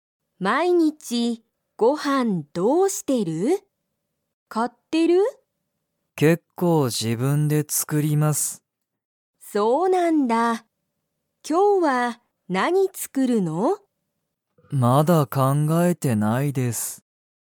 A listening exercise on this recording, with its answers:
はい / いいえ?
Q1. 鈴木すずきさんは、毎日まいにちご飯はんを買かいますか?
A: いいえ